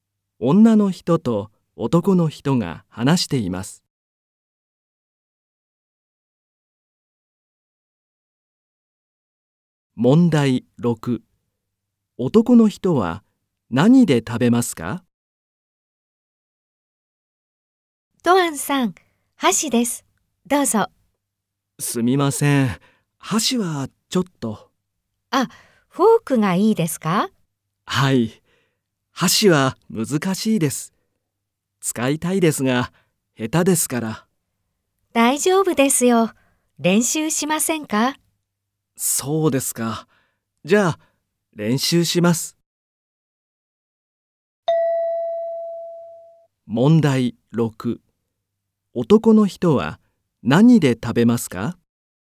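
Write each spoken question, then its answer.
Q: 男の人は何で食べますか?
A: 箸(練習します)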